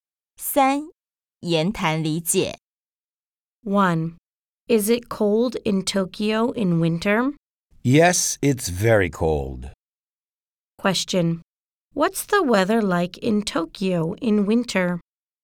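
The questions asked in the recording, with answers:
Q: What's the weather like in Tokyo in winter?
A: It's very cold.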